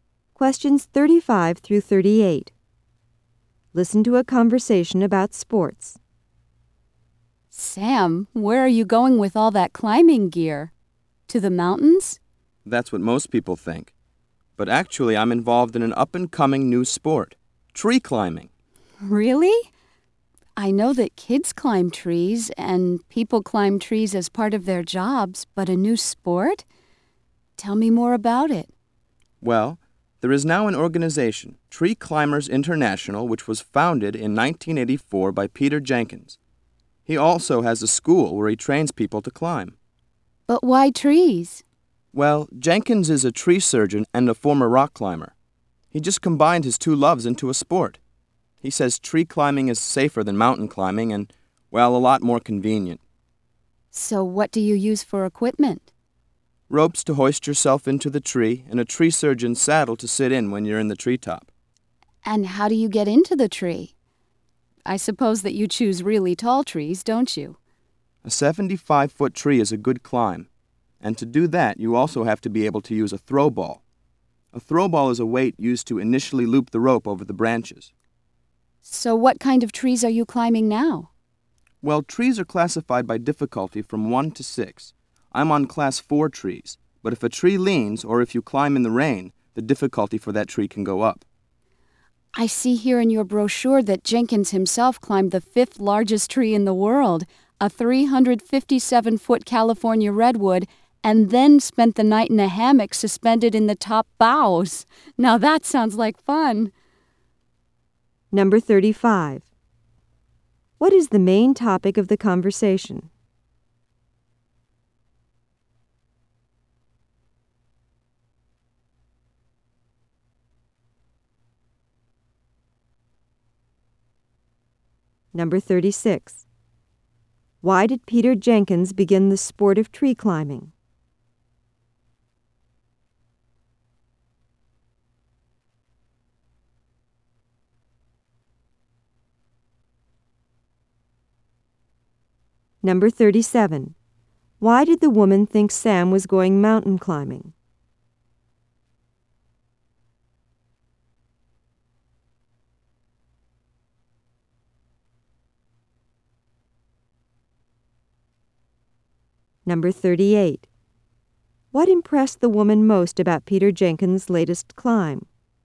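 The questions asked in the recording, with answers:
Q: What is the main topic of the conversation?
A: Tree climbing as a new sport

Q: Why did Peter Jenkins begin the sport of tree climbing?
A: To combine his two loves, tree surgery and rock climbing

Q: Why did the woman think Sam was going mountain climbing?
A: Because he was carrying climbing gear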